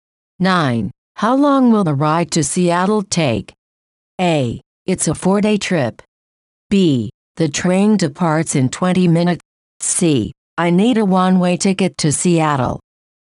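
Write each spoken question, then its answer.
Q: How long will the ride to Seattle take?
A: A: It's a 4-day trip.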